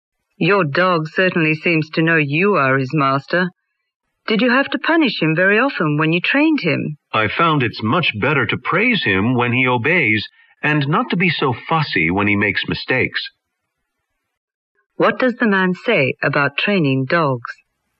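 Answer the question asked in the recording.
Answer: Praise works better than punishment.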